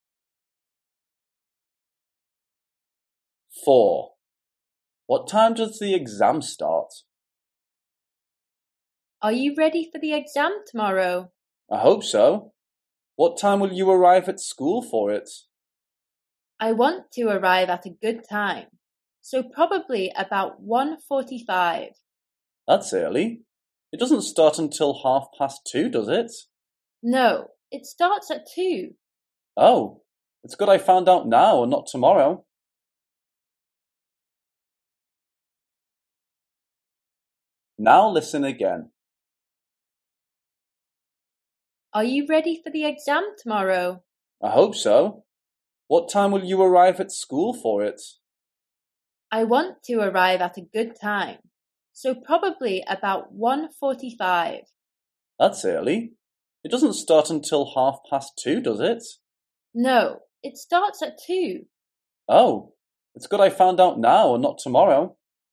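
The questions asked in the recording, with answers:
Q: What time does the exam start?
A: 2:00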